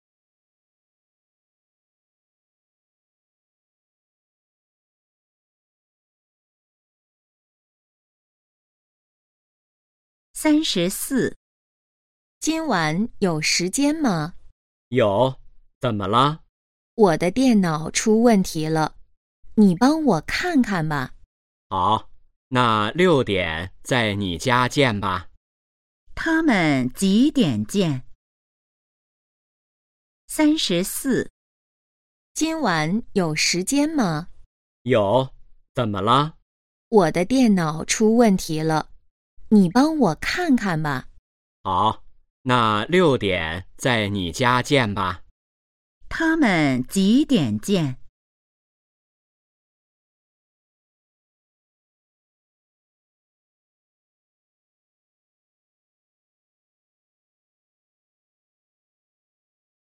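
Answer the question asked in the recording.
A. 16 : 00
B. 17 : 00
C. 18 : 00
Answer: C. 18 : 00

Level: HSK2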